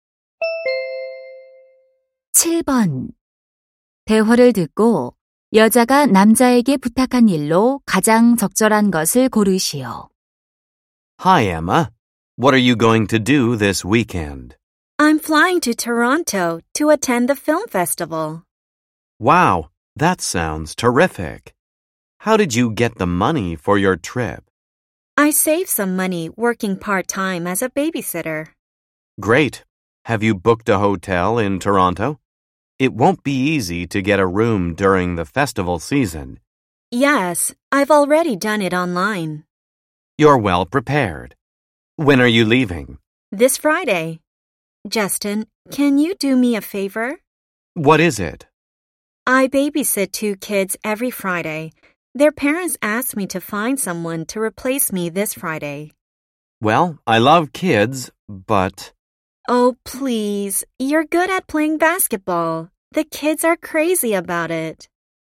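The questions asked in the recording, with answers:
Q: 대화를 듣고 여자가 남자에게 부탁한 일로 가장 적절한 것을 고르시오.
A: 금요일에 대신 아이들 돌보기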